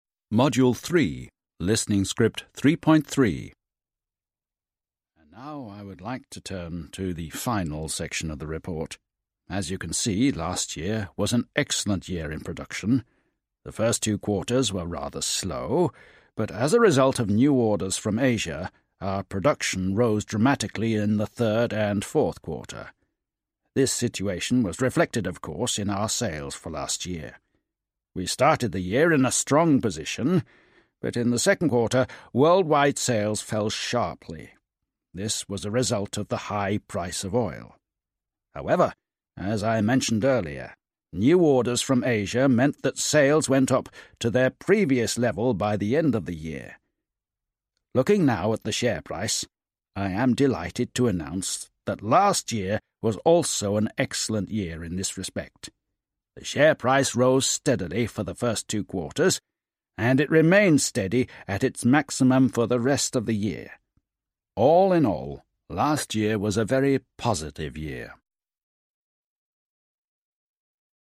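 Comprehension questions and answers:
Listen and answer questions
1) What performance was last year in production generally?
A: Excellent

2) What performance was the first two quarters?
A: Rather slow

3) What performance was the third and fourth quarter? The reason?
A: Production rose dramatically because of new orders from Asia

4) What performance was last year in the sales generally?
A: It reflected production: a strong start, a sharp fall in the second quarter, then a recovery to the previous level by the end of the year

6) Did the worldwide sales fall or rise in the second quarter? In what kind of degree or level? What were the cause?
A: They fell sharply because of the high price of oil

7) What performance was the sales of the corporate in the end of the year?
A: Sales went back up to their previous level

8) What performance was the share price for the first two quarters last year? 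What about the second half of the year?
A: It rose steadily, then remained steady at its maximum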